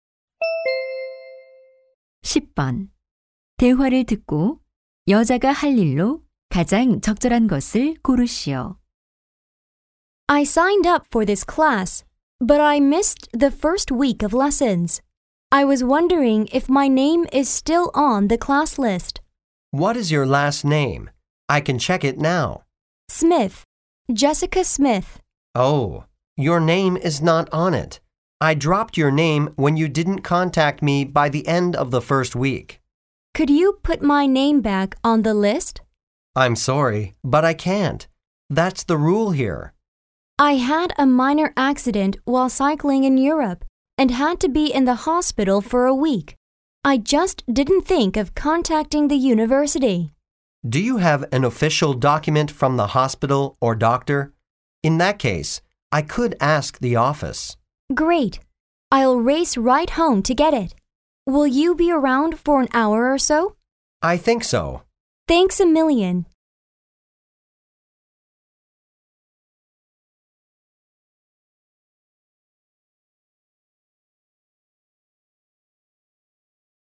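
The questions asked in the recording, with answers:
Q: 대화를 듣고 여자가 할 일로 가장 적절한 것을 고르시오.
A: 집에 가서 병원 서류 가져오기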